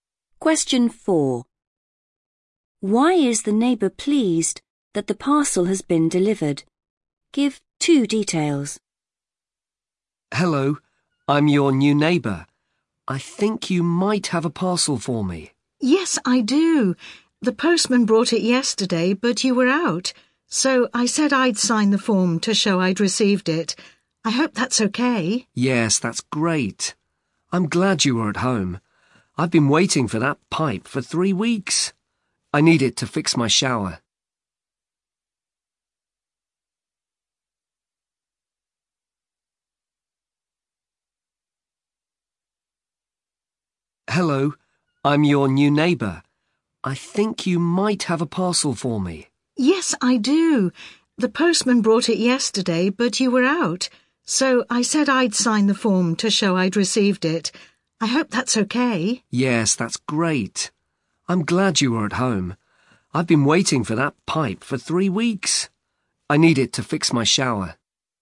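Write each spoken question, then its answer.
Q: Why is the neighbour pleased that the parcel has been delivered?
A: he has waited 3 weeks for the pipe; he needs it to fix his shower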